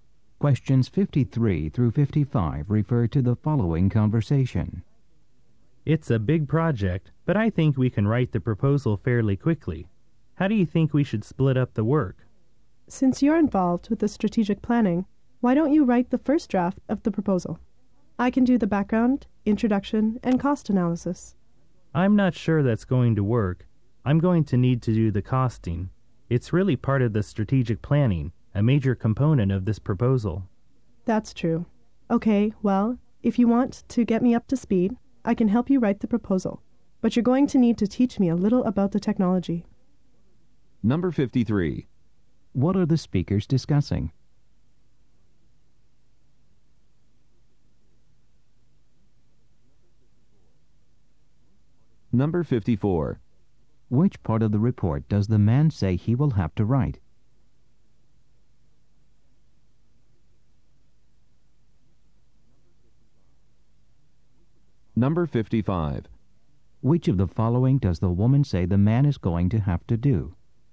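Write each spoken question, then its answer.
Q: What are the speakers discussing?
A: Writing a proposal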